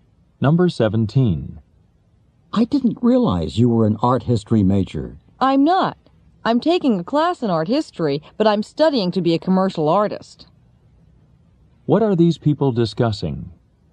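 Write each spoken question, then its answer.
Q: What are these people discussing?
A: The woman's studies: she's taking an art history class but studying to be a commercial artist.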